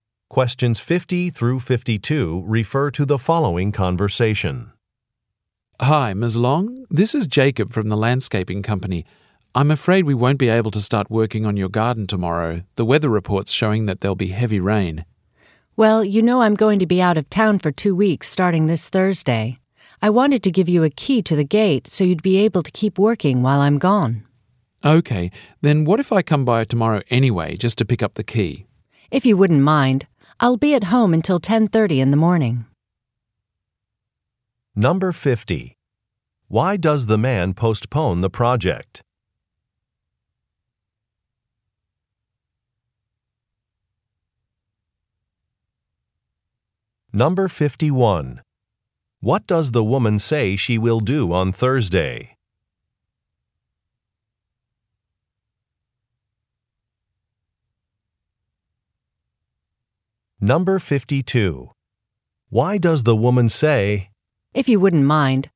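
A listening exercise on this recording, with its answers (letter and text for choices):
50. Why does the man postpone the project?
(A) A permit is delayed.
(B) The weather will be bad.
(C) A coworker is unavailable.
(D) Some materials have not arrived.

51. What does the woman say she will do on Thursday?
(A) Leave for a trip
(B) Start a new job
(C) Meet with a supplier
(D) Volunteer at a public park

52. Why does the woman say, "if you wouldn't mind"?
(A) To suggest a solution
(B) To ask for permission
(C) To make a complaint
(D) To accept an offer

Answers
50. (B) The weather will be bad.
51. (A) Leave for a trip
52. (D) To accept an offer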